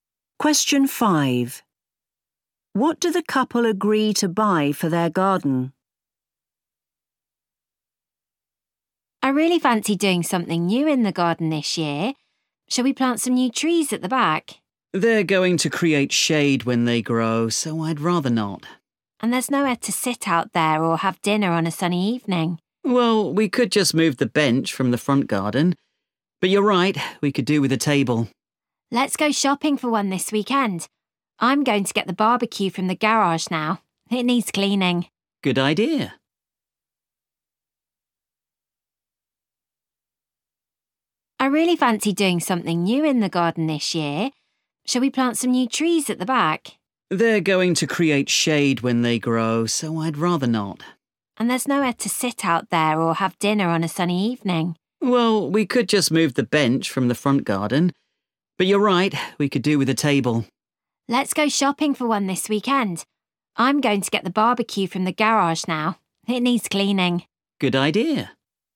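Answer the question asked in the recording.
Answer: A table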